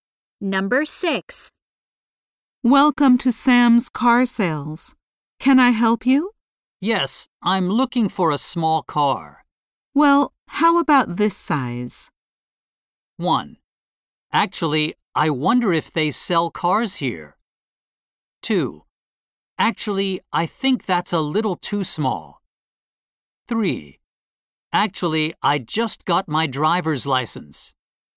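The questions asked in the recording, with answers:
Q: Well, how about this size?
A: 2: Actually, I think that's a little too small.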